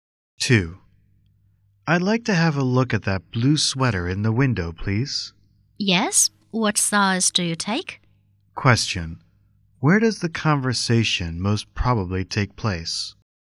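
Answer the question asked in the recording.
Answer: In a clothing store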